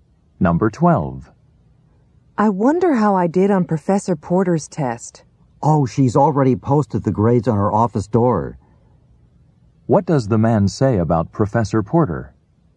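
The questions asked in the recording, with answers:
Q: What does the man say about Professor Porter?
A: She has already posted the grades on her office door.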